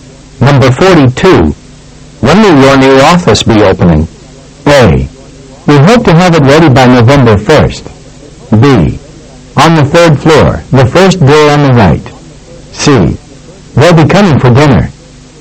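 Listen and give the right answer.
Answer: A: We hope to have it ready by November 1st.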